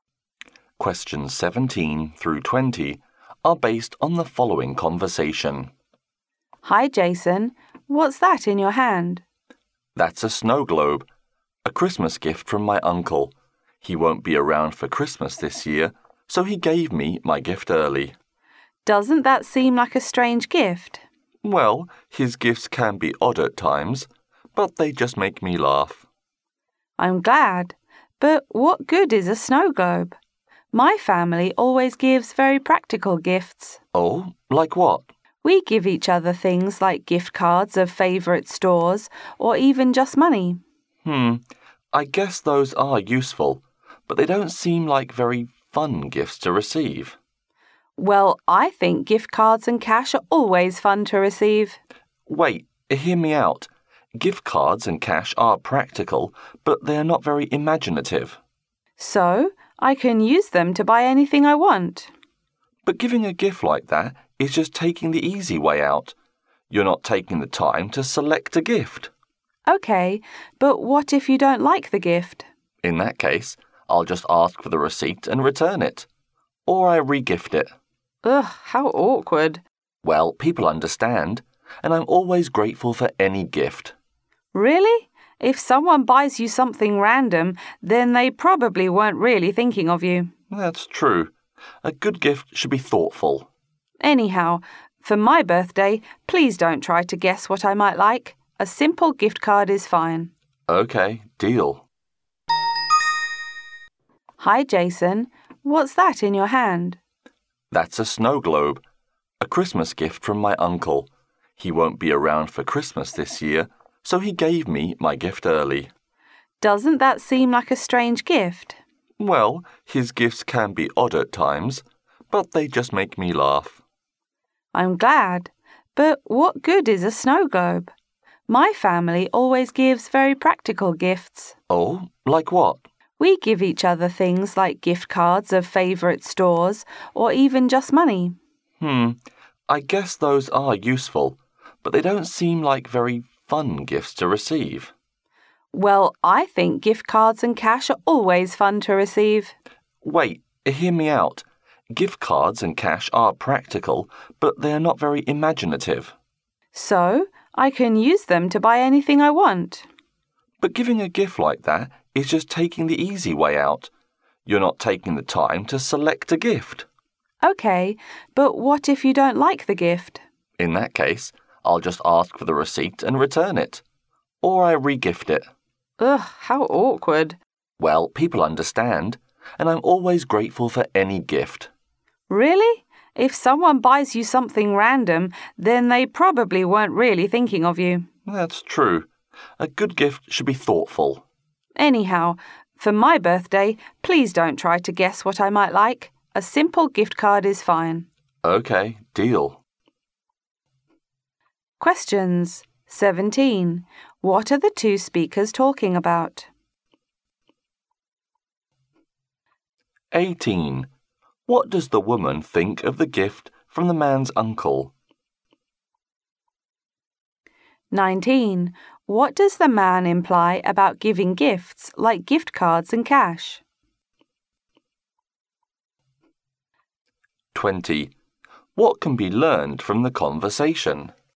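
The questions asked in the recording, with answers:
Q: What are the two speakers talking about?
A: Gifts

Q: What does the woman think of the gift from the man's uncle?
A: It is strange and not useful

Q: What does the man imply about giving gifts like gift cards and cash?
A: It is taking the easy way out; not imaginative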